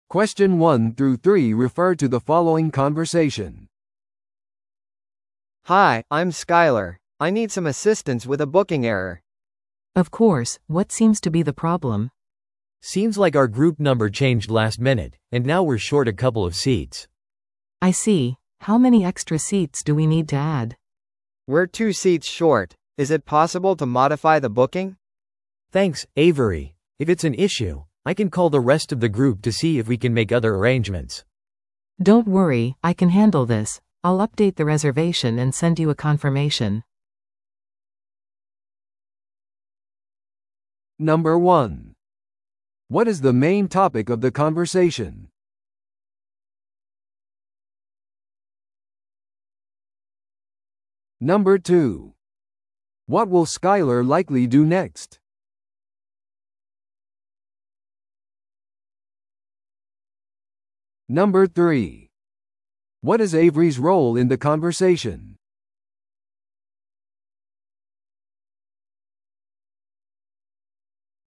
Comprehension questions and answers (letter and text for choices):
Listen to the audio below and answer the questions.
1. What is the main topic of the conversation?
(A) 空港への遅刻。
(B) 予約の過剰請求。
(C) 予約のグループサイズの変更を対応すること。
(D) グループミーティングのスケジュール決め。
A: (C) 予約のグループサイズの変更を対応すること。

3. What is Avery's role in the conversation?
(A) 彼女はグループの新しい目的地を探している。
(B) 彼女はスカイラーの席不足の問題を解決している。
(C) 彼女はグループの交通手段を手配している。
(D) 彼女は席をオーバーブッキングする責任がある。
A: (B) 彼女はスカイラーの席不足の問題を解決している。

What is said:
A: Hi, I'm Skyler. I need some assistance with a booking error.
B: Of course, what seems to be the problem?
C: Seems like our group number changed last minute, and now we're short a couple of seats.
B: I see. How many extra seats do we need to add?
A: We're two seats short. Is it possible to modify the booking?
C: Thanks, Avery. If it's an issue, I can call the rest of the group to see if we can make other arrangements.
B: Don't worry, I can handle this. I'll update the reservation and send you a confirmation.